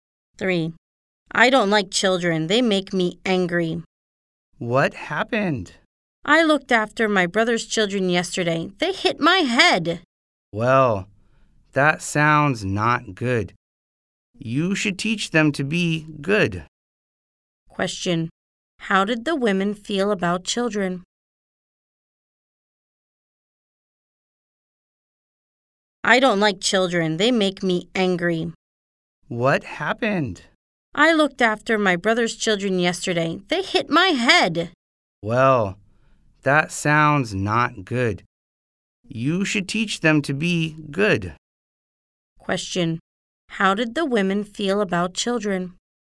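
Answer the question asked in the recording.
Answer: Angry; she doesn't like them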